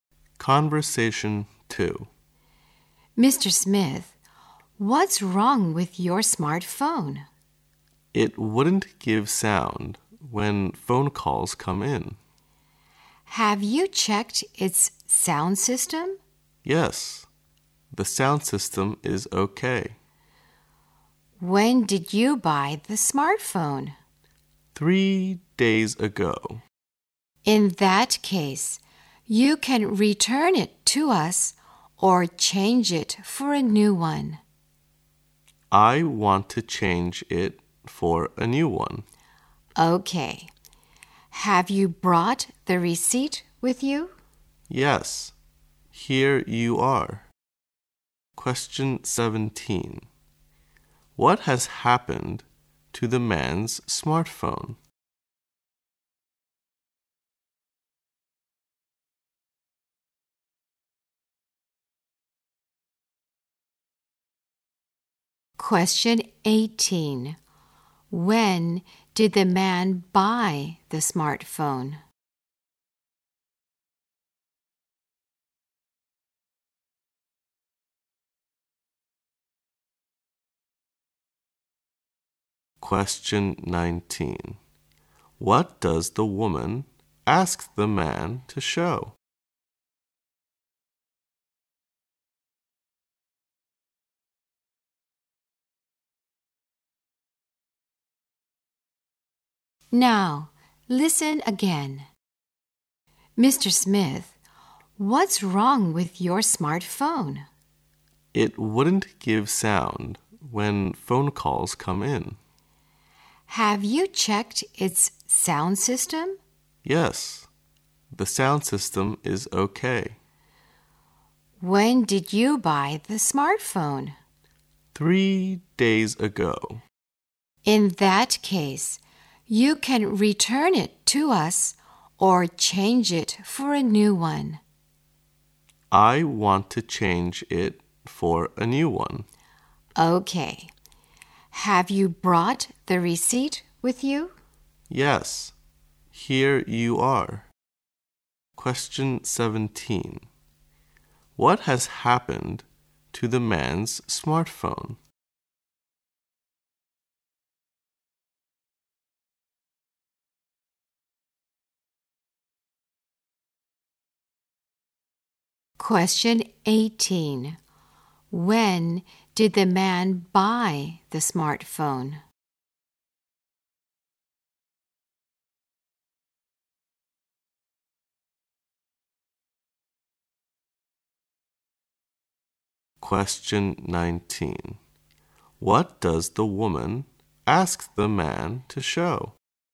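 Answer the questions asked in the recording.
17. It gives no sound when calls come in
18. 3 days ago
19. The receipt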